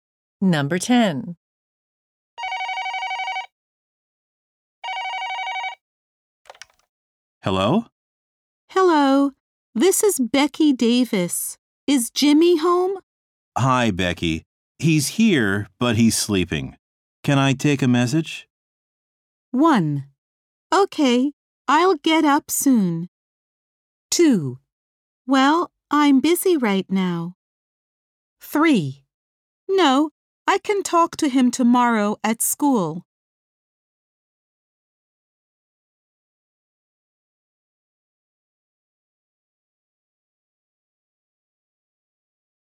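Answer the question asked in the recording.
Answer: 3: No, I can talk to him tomorrow at school.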